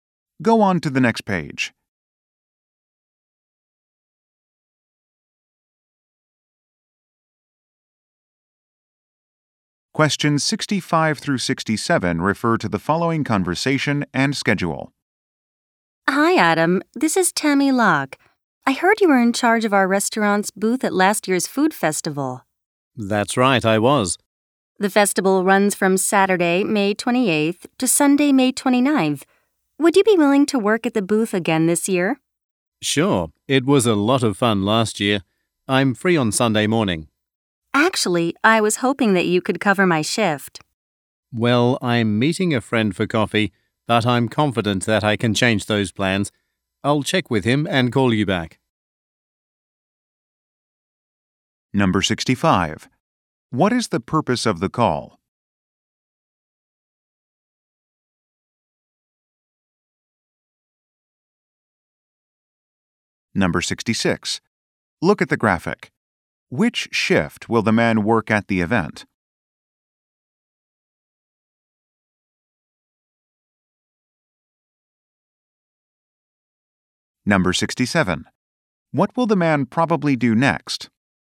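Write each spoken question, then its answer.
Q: What is the purpose of the call?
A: To ask the man to work at the festival booth

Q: What will the man probably do next?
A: Contact his friend to change their plans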